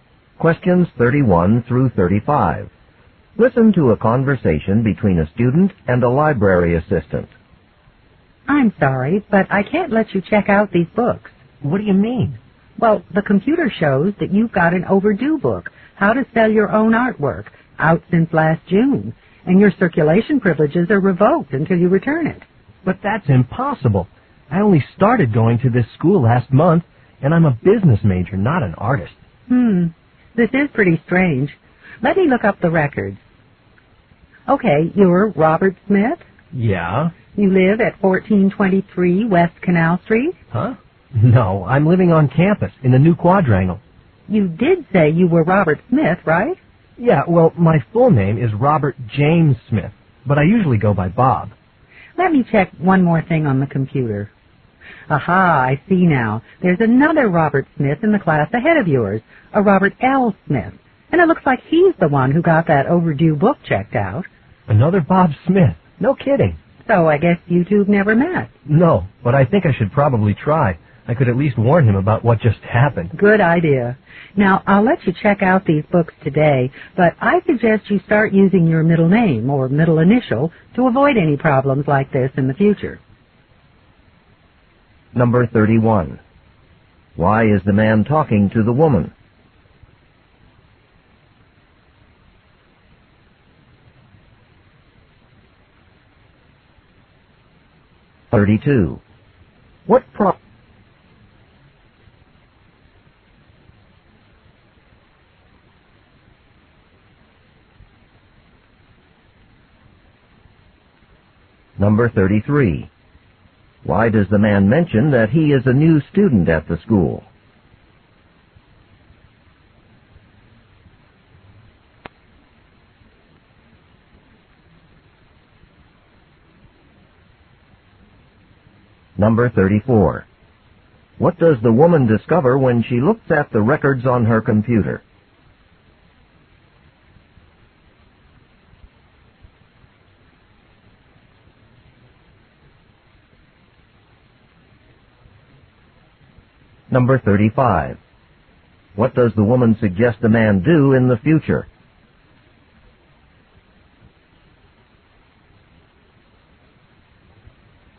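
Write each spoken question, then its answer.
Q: Why is the man talking to the woman?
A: He wants to check out books.

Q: Why does the man mention that he is a new student at the school?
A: To show he couldn't have had a book overdue since last June.

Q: What does the woman discover when she looks at the records on her computer?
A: Another student named Robert Smith has the overdue book.

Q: What does the woman suggest the man do in the future?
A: Use his middle name or middle initial.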